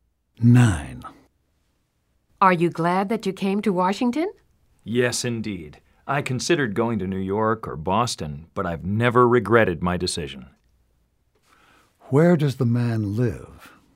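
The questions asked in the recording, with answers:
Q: Where does the man live?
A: Washington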